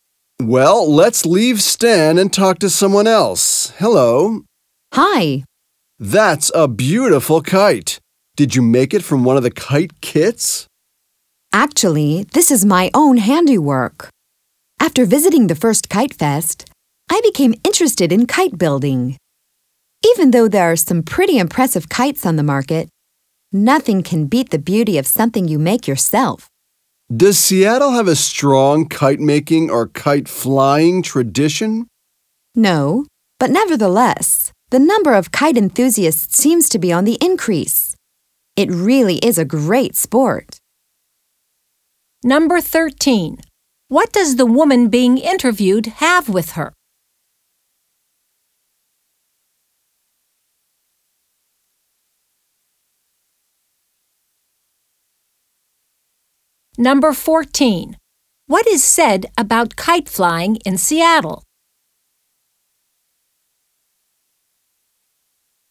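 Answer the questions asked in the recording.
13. A kite she made herself
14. There is no strong tradition, but the number of enthusiasts is increasing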